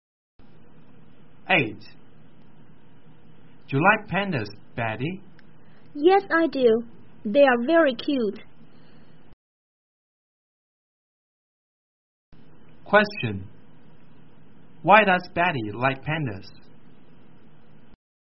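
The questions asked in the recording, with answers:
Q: Why does Betty like pandas?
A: Because they are very cute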